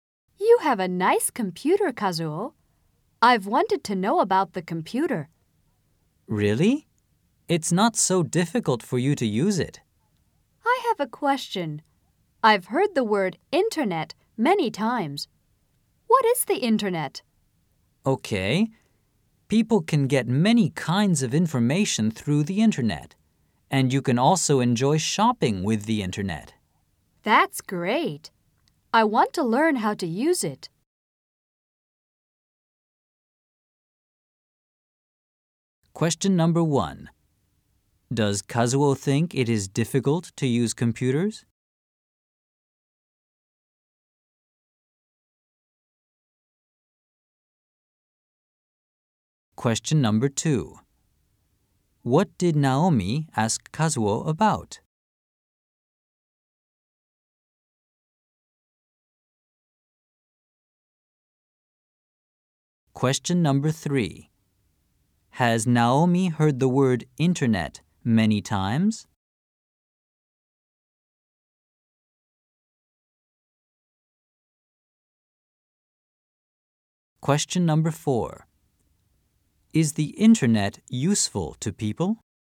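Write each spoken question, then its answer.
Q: Does Kazuo think it is difficult to use computers?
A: No, he doesn't.

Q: What did Naomi ask Kazuo about?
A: The internet.

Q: Has Naomi heard the word internet many times?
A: Yes, she has.

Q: Is the internet useful to people?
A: Yes, it is.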